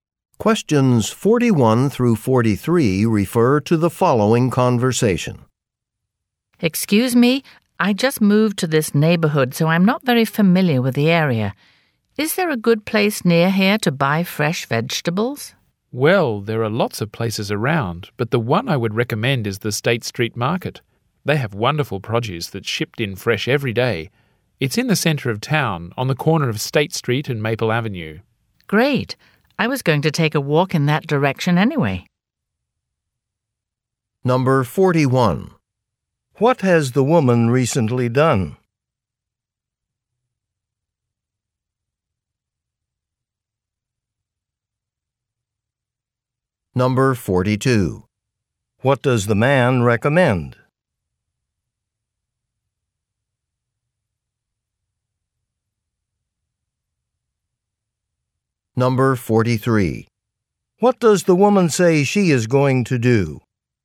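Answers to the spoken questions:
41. Moved to the neighborhood
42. The State Street Market
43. Take a walk toward the town center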